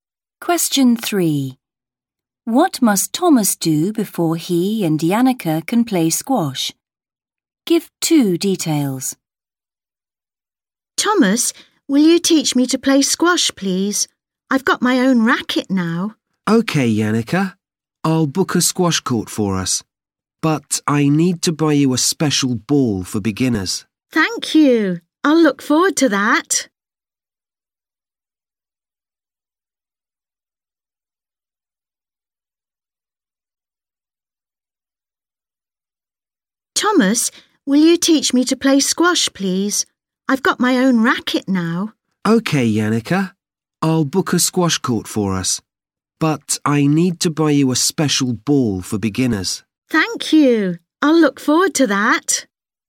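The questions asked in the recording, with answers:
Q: What must Thomas do before he and Janneke can play squash?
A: Book a squash court and buy a special ball for beginners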